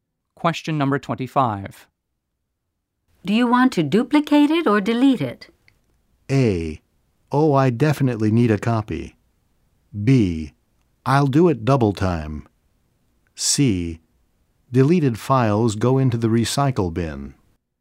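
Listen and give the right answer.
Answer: A: Oh, I definitely need a copy.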